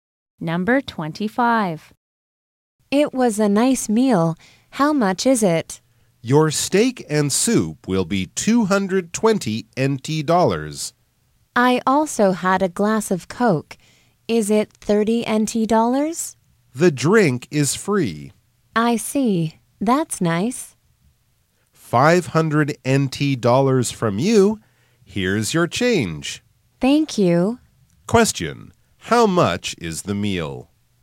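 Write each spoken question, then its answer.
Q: How much is the meal?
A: 220 NT dollars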